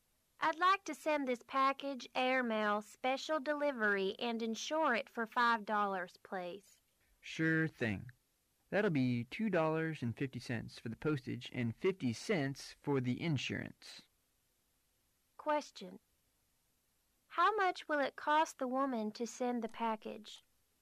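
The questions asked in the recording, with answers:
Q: How much will it cost the woman to send the package?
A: $3.00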